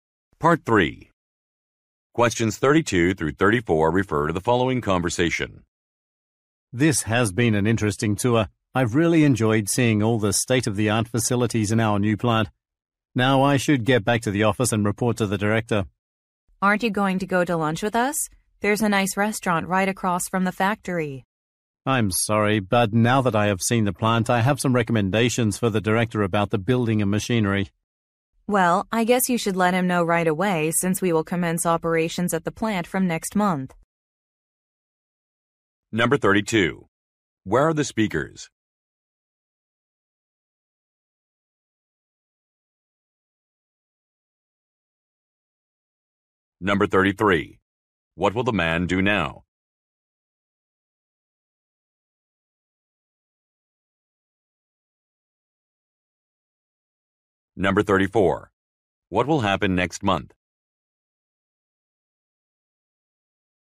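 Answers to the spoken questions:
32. At a new plant (factory)
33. Go back to the office and report to the director
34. Operations will start at the plant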